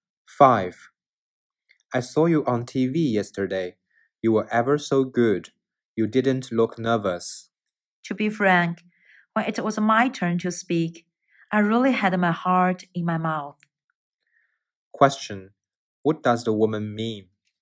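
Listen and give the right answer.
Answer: She was actually very nervous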